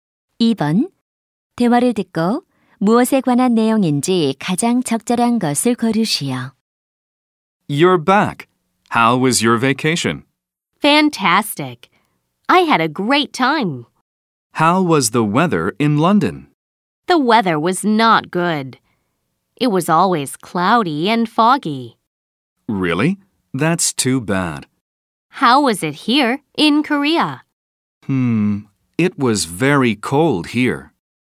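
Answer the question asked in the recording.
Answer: 날씨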